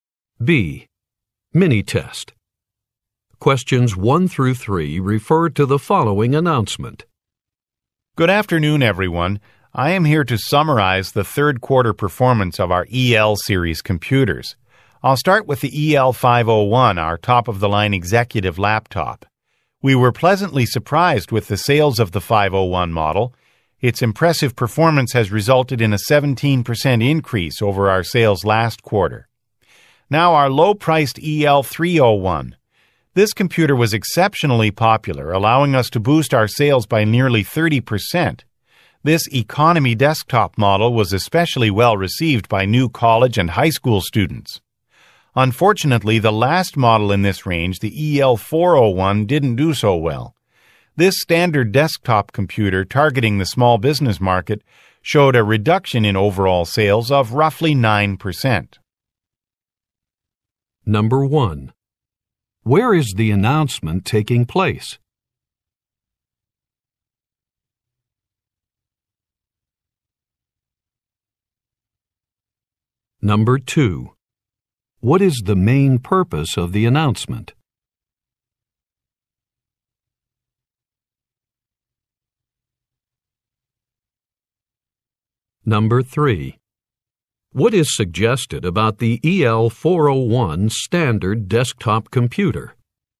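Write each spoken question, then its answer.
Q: What is the main purpose of the announcement?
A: To summarize third quarter sales performance of EL series computers

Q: What is suggested about the EL401 standard desktop computer?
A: Its sales fell by about 9%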